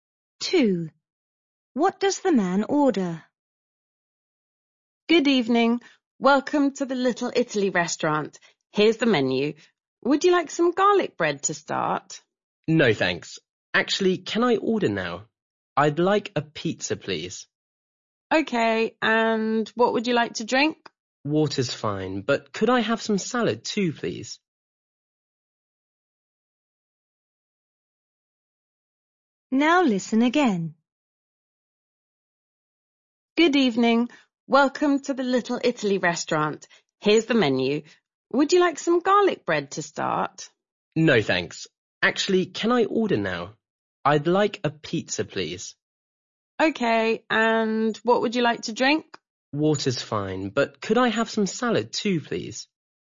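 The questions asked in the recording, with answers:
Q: What does the man order?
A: A pizza and some salad, with water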